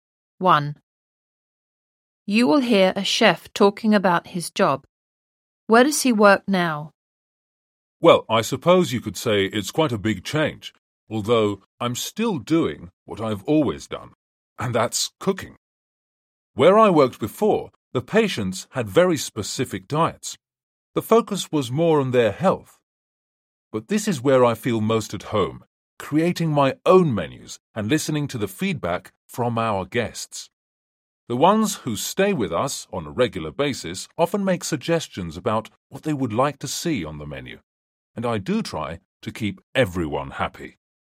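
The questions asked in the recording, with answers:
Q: Where does he work now?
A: In a hotel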